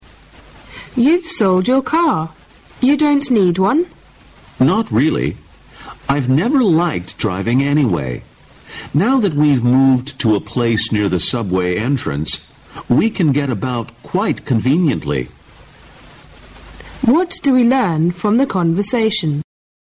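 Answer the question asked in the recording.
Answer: The speakers no longer need a car because they live near the subway and can get around conveniently.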